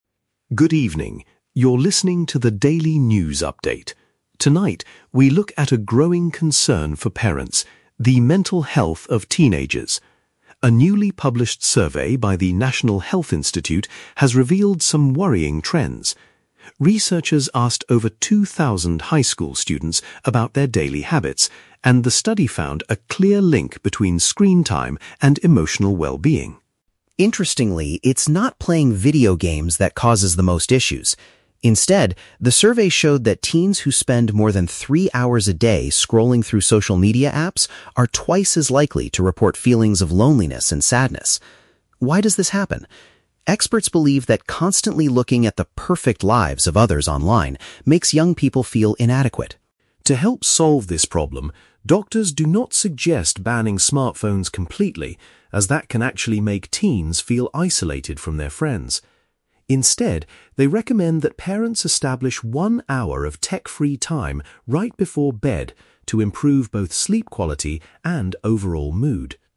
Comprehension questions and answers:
Listen to a short news bulletin. Choose the correct answer (A, B, or C) for each question.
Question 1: What did the recent survey discover about teenagers?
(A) Playing video games is the main cause of their unhappiness.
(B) Spending heavy amounts of time on social networks increases negative emotions.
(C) High school students are sleeping much less than they did in the past.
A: Spending heavy amounts of time on social networks increases negative emotions.

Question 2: According to experts, why do social apps make young people feel sad?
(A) They are frequently bullied by their classmates on these digital platforms.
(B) They feel pressured to spend money on products they see online.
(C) They compare their own reality to the unrealistic images of other people.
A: They compare their own reality to the unrealistic images of other people.

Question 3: What do doctors advise parents to do?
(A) Take away their children's mobile devices entirely.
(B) Create a short period without electronics before going to sleep.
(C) Talk to their children about their school problems every night.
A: Create a short period without electronics before going to sleep.

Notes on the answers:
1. The Key: The news anchor says that teens who spend more than three hours "scrolling through social media apps" are more likely to report "feelings of loneliness and sadness". This is paraphrased as "spending heavy amounts of time on social networks increases negative emotions". The Trap (A): Video games are explicitly mentioned, but the speaker says "it's not playing video games that causes the most issues" (Mentioned but rejected). Plausible Trap (C): Sleep is mentioned at the very end of the broadcast, but the survey's main discovery was about screen time, not a historical comparison of sleep habits.
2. The Key: The experts believe that looking at the "'perfect' lives of others online makes young people feel inadequate". This perfectly matches the idea of comparing their reality to "unrealistic images of other people". Plausible Trap (A): Cyberbullying is a very real problem that makes teenagers sad, but it is not the reason mentioned in this specific news report. Plausible Trap (B): Spending money or seeing advertisements is common on social media, but again, it is not mentioned in the audio.
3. The Key: Doctors recommend that parents establish "one hour of tech-free time right before bed". This is paraphrased as "Create a short period without electronics before going to sleep". The Trap (A): The speaker mentions "banning smartphones completely" (taking devices away entirely), but explicitly says doctors do not suggest doing this because it causes isolation (Mentioned but rejected). Plausible Trap (C): Talking to children is great parenting advice, but it is not the medical advice provided in this news bulletin.

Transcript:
Robert: Good evening. You're listening to the Daily News update. Tonight, we look at a growing concern for parents: the mental health of teenagers. A newly published survey by the National Health Institute has revealed some worrying trends. Researchers asked over two thousand high school students about their daily habits, and the study found a clear link between screen time and emotional well-being.
Interestingly, it's not playing video games that causes the most issues. Instead, the survey showed that teens who spend more than three hours a day scrolling through social media apps are twice as likely to report feelings of loneliness and sadness. Why does this happen? Experts believe that constantly looking at the "perfect" lives of others online makes young people feel inadequate.
To help solve this problem, doctors do not suggest banning smartphones completely, as that can actually make teens feel isolated from their friends. Instead, they recommend that parents establish one hour of tech-free time right before bed to improve both sleep quality and overall mood.

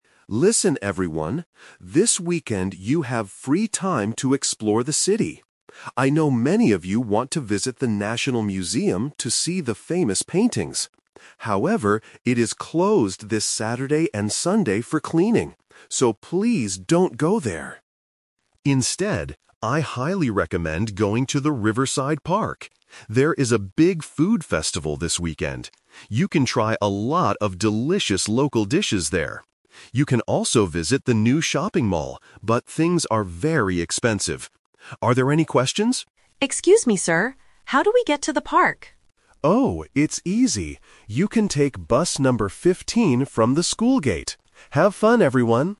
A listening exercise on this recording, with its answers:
Listen to a teacher talking to a group of exchange students about their weekend. Choose the correct answer (A, B, or C) for each question.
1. Why shouldn't the students visit the National Museum this weekend?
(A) Because the tickets are too expensive.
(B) Because it is closed for cleaning.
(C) Because there are no famous paintings.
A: Because it is closed for cleaning.

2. What special event is happening at the Riverside Park?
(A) A food festival.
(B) A music concert.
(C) An art exhibition.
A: A food festival.

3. How can the students travel to the park?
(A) They can take bus number 50.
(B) They can walk from the shopping mall.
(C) They can take bus number 15.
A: They can take bus number 15.

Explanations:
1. The teacher says the museum is "closed this Saturday and Sunday for cleaning." Option (A) is a trap; the word "expensive" is used later to describe the shopping mall, not the museum. Option (C) is false because the teacher mentions the museum does have famous paintings.
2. The teacher recommends Riverside Park because "There is a big food festival this weekend." Option (B) is a plausible event for a park but is not mentioned. Option (C) is a trap related to the museum (art/paintings).
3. The teacher explicitly tells the student, "You can take bus number 15." Option (A) is a phonetic trap ("fifty" sounds similar to "fifteen", một lỗi nghe rất phổ biến ở A2). Option (B) is not mentioned.

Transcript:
Teacher: Listen everyone! This weekend you have free time to explore the city. I know many of you want to visit the National Museum to see the famous paintings. However, it is closed this Saturday and Sunday for cleaning. So, please don't go there!
Instead, I highly recommend going to the Riverside Park. There is a big food festival this weekend. You can try a lot of delicious local dishes there. You can also visit the new shopping mall, but things are very expensive. Are there any questions?
Student: Excuse me, sir. How do we get to the park?
Teacher: Oh, it's easy. You can take bus number 15 from the school gate. Have fun, everyone!

